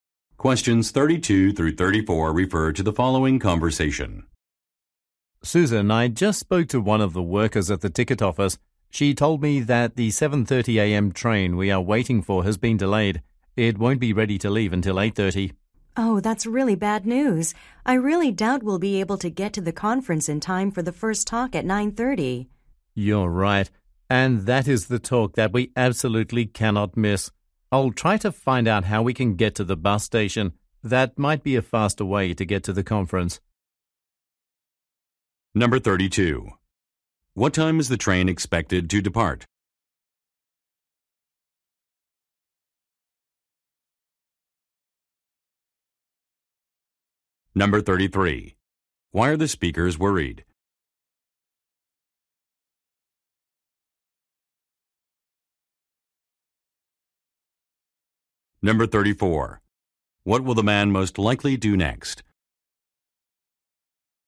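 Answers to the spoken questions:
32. At 8:30
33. They may miss the first talk at the conference
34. Find out how to get to the bus station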